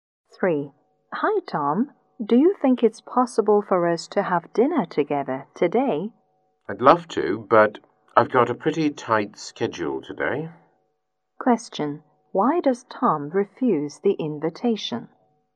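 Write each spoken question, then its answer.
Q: Why does Tom refuse the invitation?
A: He has a tight schedule today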